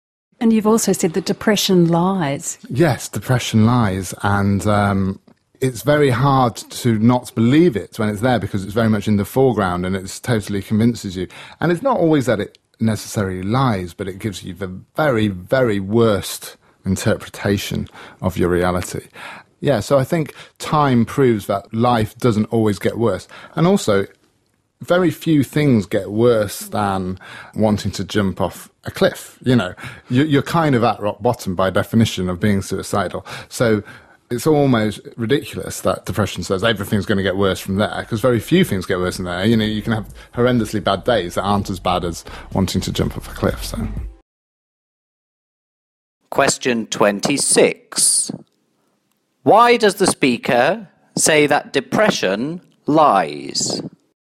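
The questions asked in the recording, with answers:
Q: Why does the speaker say that depression lies?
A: It gives you the very worst interpretation of your reality, e.g. saying everything will get worse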